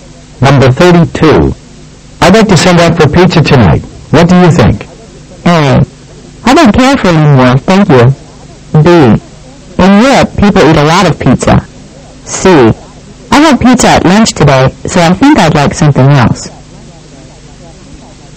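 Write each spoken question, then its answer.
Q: What do you think?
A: C: I had pizza at lunch today, so I think I'd like something else.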